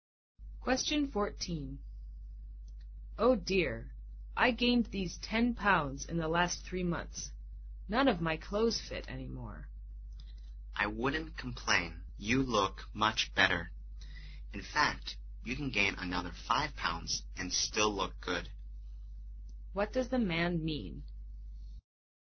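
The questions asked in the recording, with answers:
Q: What does the man mean?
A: The woman looks better now

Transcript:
W: Oh dear, I gained these 10 pounds in the last 3 months, none of my clothes fit any more.
M: I wouldn't complain, you look much better. In fact, you can gain another 5 pounds and still look good.
Q: What does the man mean?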